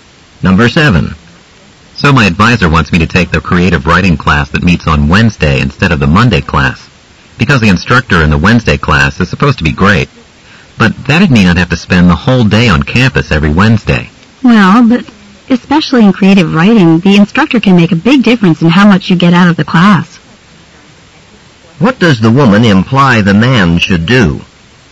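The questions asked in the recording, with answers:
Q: What does the woman imply the man should do?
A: Take the Wednesday class.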